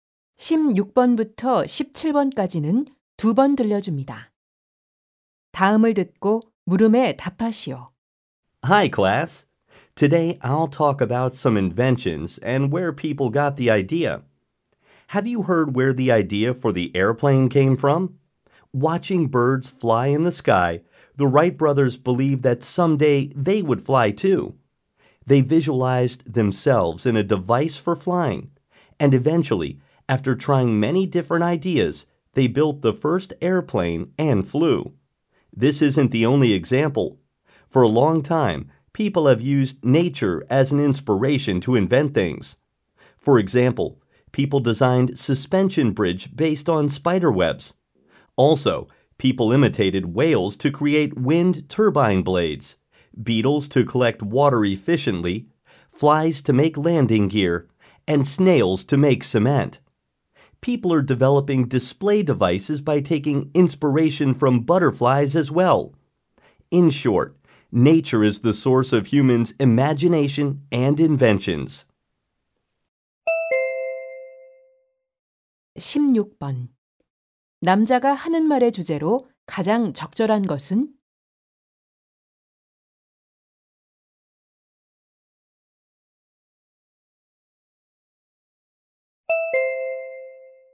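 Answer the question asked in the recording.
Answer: 자연에서 영감을 얻은 발명품들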